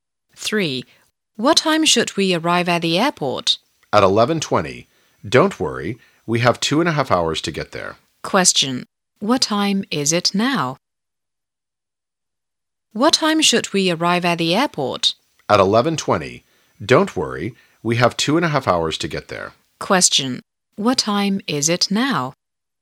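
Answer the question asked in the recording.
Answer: 8:50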